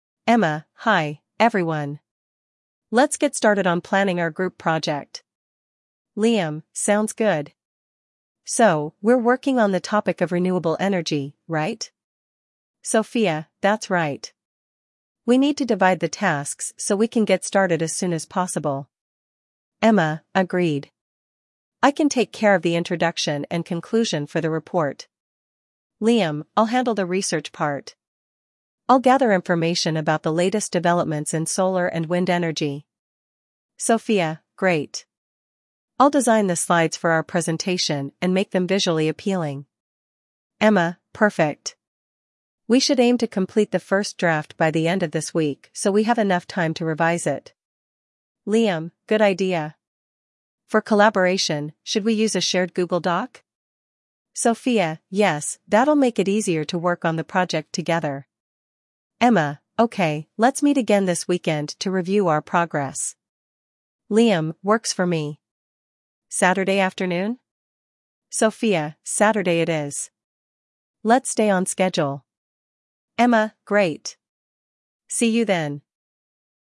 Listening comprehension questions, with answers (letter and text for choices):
After listening, read the objective questions carefully and choose the correct answers based on the audio.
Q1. What is the topic of the group project?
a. Renewable energy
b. Global warming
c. Artificial intelligence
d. Cultural diversity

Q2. What task is Sophia responsible for?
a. Researching background information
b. Designing the presentation slides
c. Writing the introduction and conclusion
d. Conducting interviews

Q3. What deadline do the classmates set for completing the first draft of the project?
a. By the end of this week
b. Next Monday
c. In two weeks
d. The day before the presentation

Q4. What tool does Emma suggest using for collaboration?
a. A shared Google Doc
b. A project management app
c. An online forum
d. Email exchanges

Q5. When do they agree to meet next to discuss their progress?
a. Tomorrow evening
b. This weekend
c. After their next class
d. Next Friday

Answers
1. a. Renewable energy
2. b. Designing the presentation slides
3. a. By the end of this week
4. a. A shared Google Doc
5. b. This weekend

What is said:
Emma: Hi, everyone. Let's get started on planning our group project.
Liam: Sounds good. So, we're working on the topic of renewable energy, right?
Sophia: That's right. We need to divide the tasks so we can get started as soon as possible.
Emma: Agreed. I can take care of the introduction and conclusion for the report.
Liam: I'll handle the research part. I'll gather information about the latest developments in solar and wind energy.
Sophia: Great. I'll design the slides for our presentation and make them visually appealing.
Emma: Perfect. We should aim to complete the first draft by the end of this week so we have enough time to revise it.
Liam: Good idea. For collaboration, should we use a shared Google Doc?
Sophia: Yes, that'll make it easier to work on the project together.
Emma: Okay, let's meet again this weekend to review our progress.
Liam: Works for me. Saturday afternoon?
Sophia: Saturday it is. Let's stay on schedule.
Emma: Great! See you then.